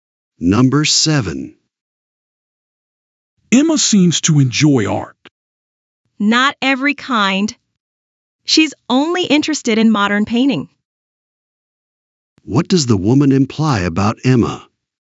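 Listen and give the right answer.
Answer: Emma only likes modern painting, not all art.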